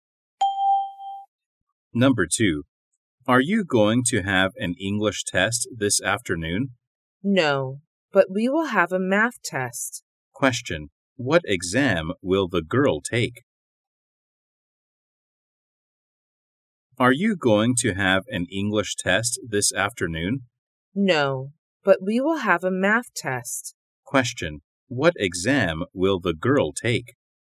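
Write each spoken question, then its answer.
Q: What exam will the girl take?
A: A math test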